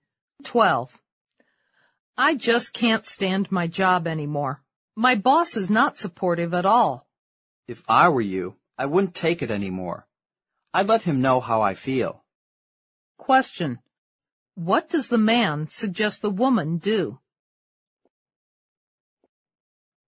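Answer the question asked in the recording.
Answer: Tell her boss how she feels.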